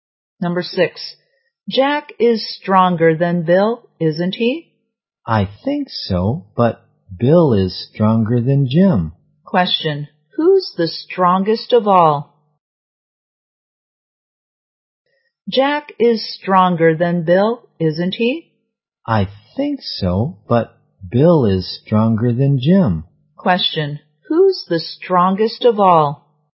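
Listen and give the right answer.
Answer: Jack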